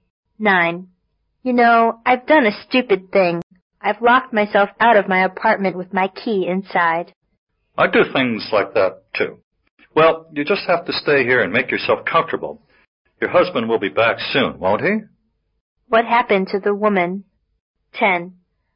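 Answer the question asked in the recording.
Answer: She locked herself out of her apartment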